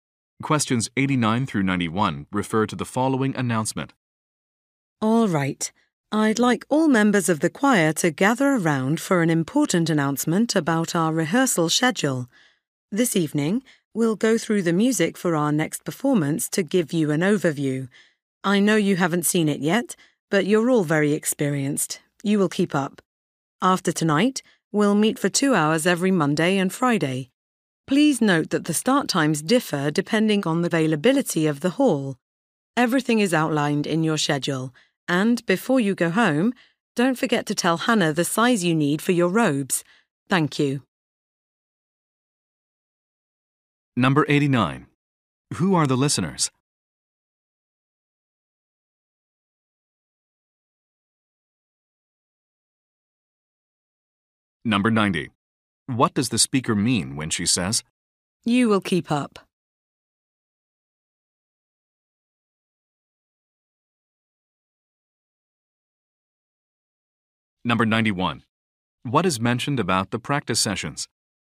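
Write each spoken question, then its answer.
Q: Who are the listeners?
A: Choir members

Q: What is mentioned about the practice sessions?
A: Start times differ depending on hall availability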